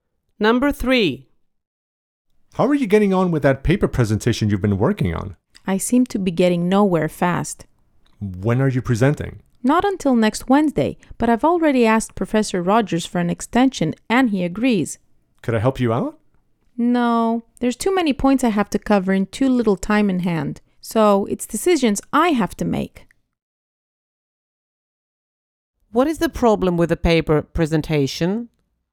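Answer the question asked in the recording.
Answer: There are too many points to cover in too little time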